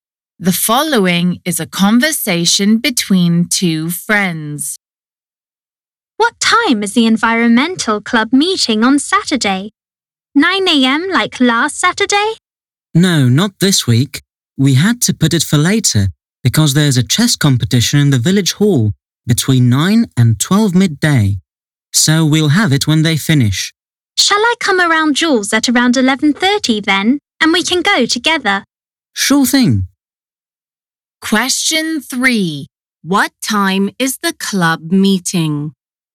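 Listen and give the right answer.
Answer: after 12 midday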